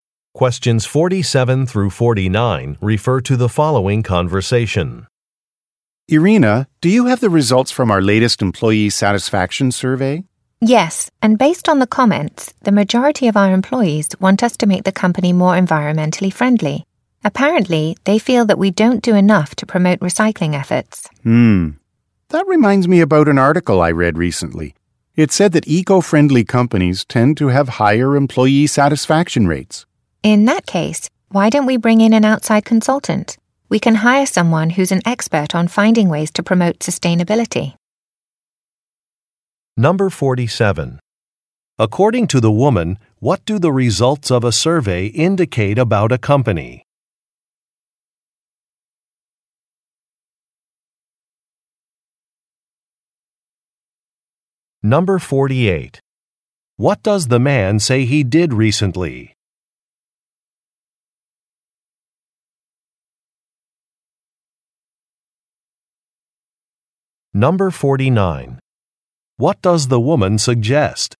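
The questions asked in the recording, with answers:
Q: According to the woman, what do the results of a survey indicate about a company?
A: Employees want the company to be more environmentally friendly

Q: What does the man say he did recently?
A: He read an article

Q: What does the woman suggest?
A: Hiring an outside consultant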